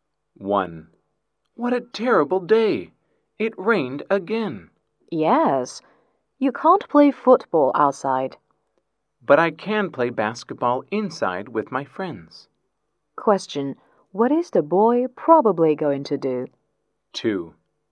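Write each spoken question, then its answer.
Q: Question, what is the boy probably going to do?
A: Play basketball inside with his friends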